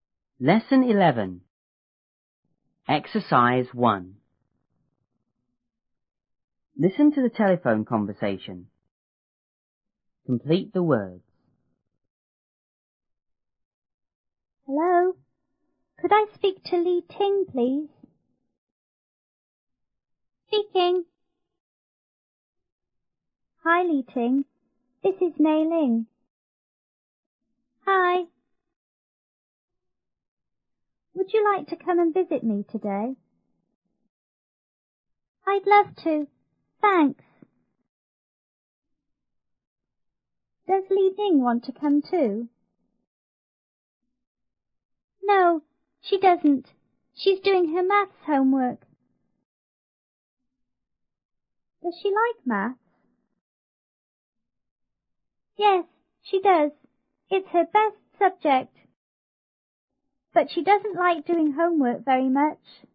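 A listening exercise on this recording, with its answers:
1.Listen to the telephone conversation.Complete the words.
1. Hello!C ___I s___ to Li Ting,please?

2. Li Ting:Hi!W___ you like to come and v__ me today?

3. Li Ting:I'd I_ to,thanks.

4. No,she d___ She's doing her maths homework.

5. Yes,she d___ It's her best subject.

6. But she d___ like doing homework very much.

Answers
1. Could, speak
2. Would, visit
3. love
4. doesn't
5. does
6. doesn't

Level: 初中英语广州版1B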